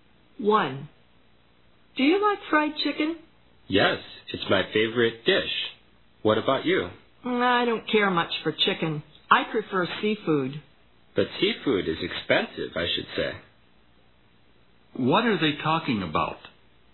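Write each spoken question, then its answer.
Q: What are they talking about?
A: Food: fried chicken and seafood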